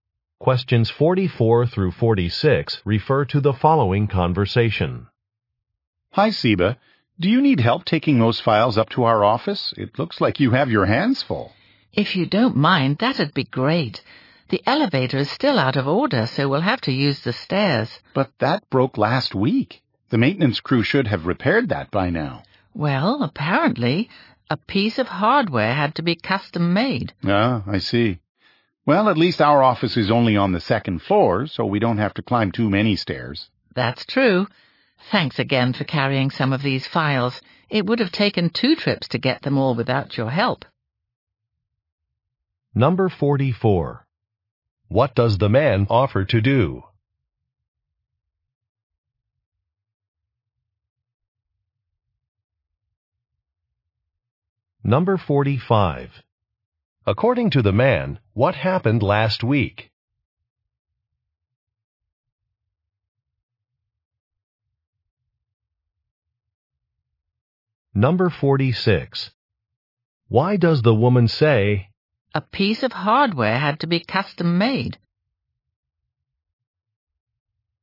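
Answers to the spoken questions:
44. Help carry files
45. The elevator broke
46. To explain why the repair is taking long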